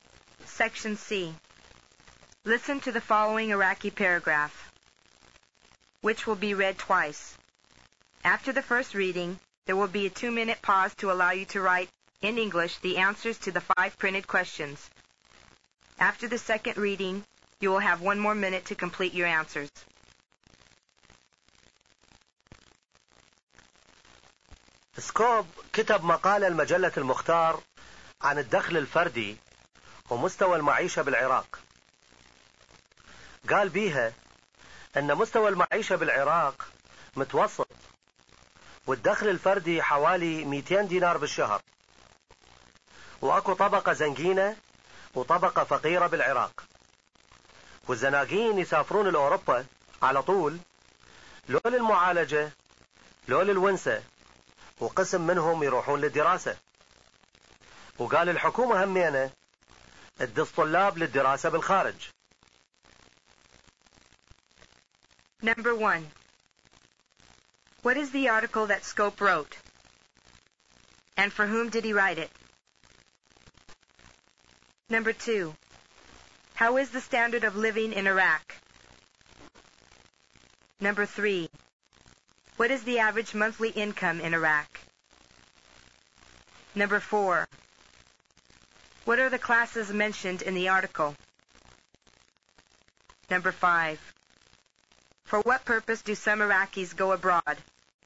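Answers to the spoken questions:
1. An article on per capita income and standard of living in Iraq, for Al-Mukhtar magazine
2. Average
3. About 200 dinars a month
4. A rich class and a poor class
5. For medical treatment, for pleasure, and to study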